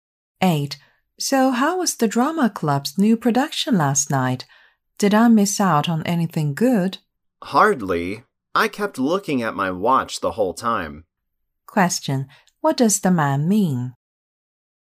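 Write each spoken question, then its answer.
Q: What does the man mean?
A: The production was boring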